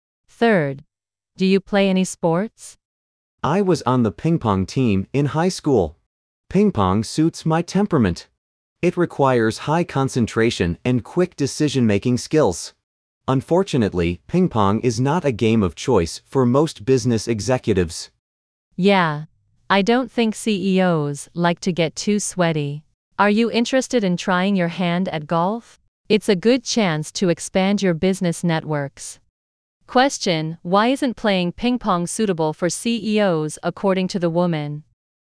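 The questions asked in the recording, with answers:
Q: why isn't playing ping pong suitable for CEOs according to the woman?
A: CEOs don't like to get too sweaty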